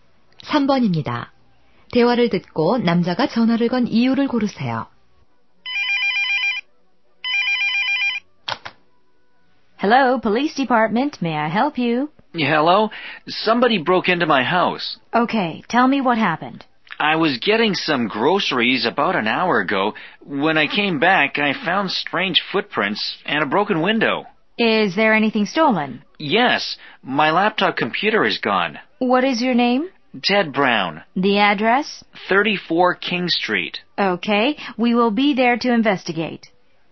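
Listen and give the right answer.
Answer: 집에 도둑이 들어 신고하려고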